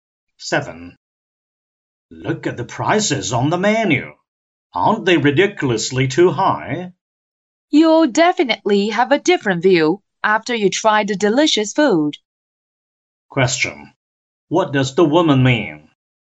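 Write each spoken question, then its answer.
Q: What does the woman mean?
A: The food is worth the high prices.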